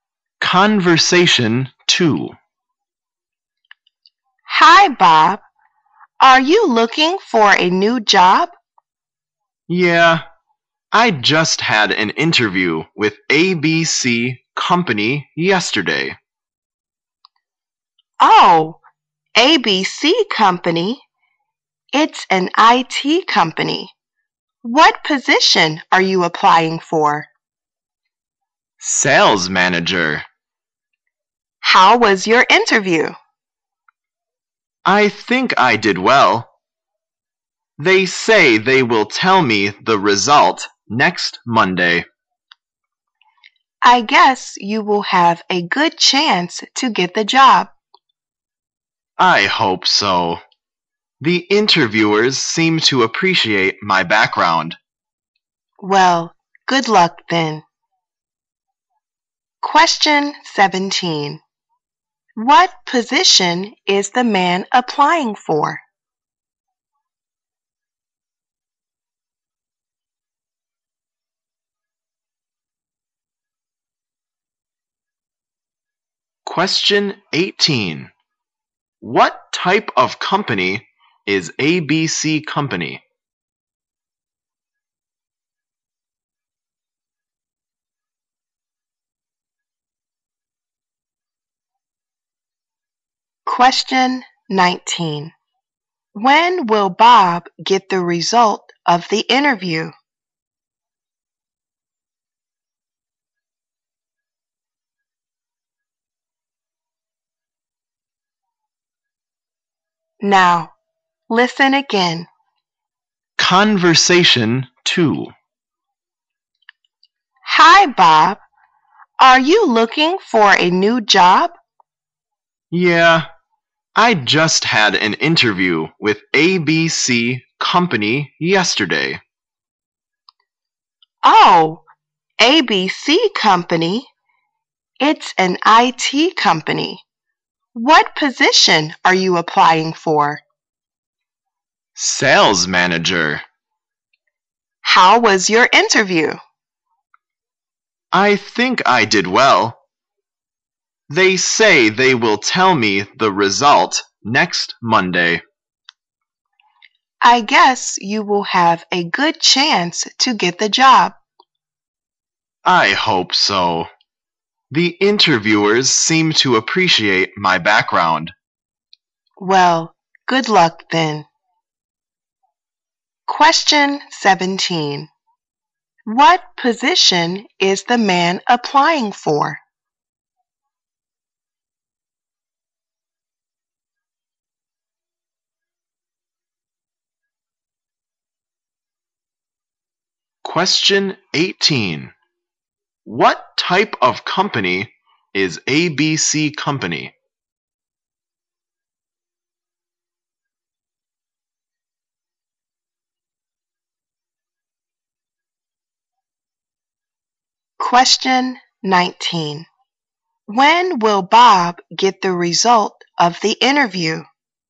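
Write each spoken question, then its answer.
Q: What position is the man applying for?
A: Sales manager

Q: What type of company is ABC Company?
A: An IT company

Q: When will Bob get the result of the interview?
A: Next Monday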